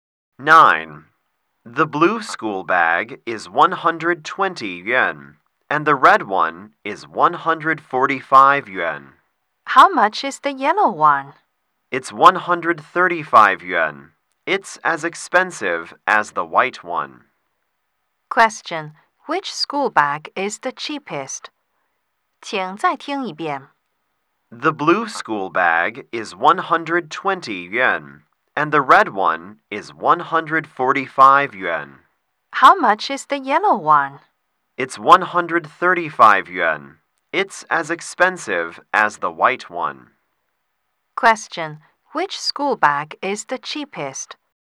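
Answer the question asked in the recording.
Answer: The blue one.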